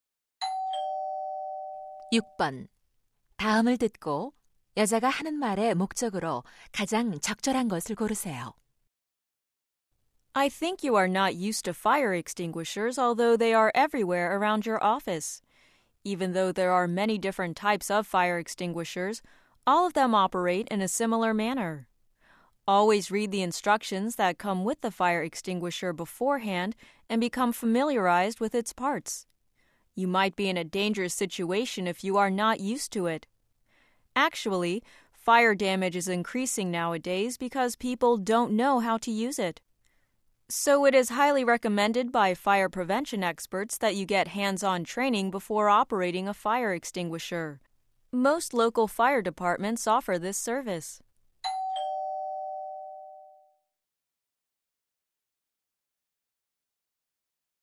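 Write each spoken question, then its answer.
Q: 다음을 듣고 여자가 하는 말의 목적으로 가장 적절한 것을 고르세요.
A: 소화기 사용 실습 교육 받기를 권장하려고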